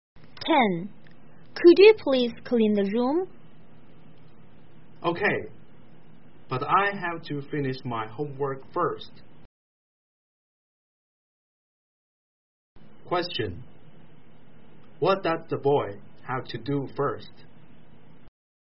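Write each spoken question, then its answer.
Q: What does the boy have to do first?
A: Finish his homework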